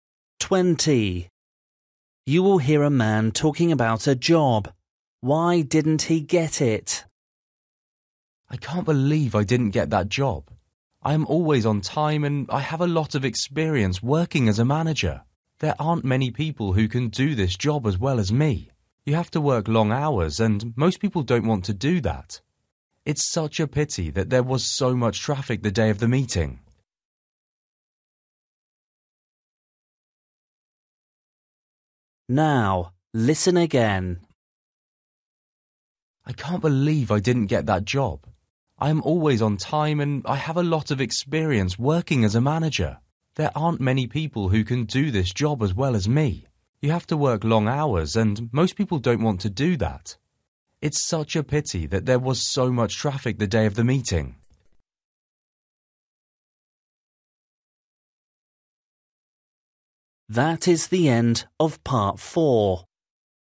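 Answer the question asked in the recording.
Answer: He was late for the meeting because of traffic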